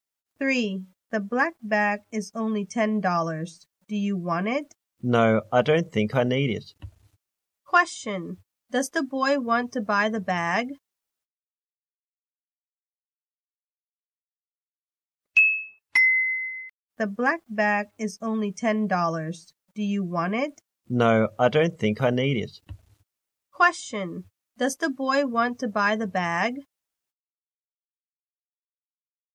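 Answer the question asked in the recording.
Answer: No, he doesn't.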